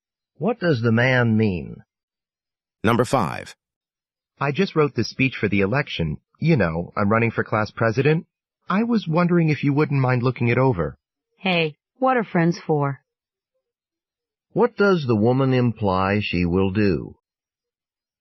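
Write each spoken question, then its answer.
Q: What does the woman imply she will do?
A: She will look over his speech.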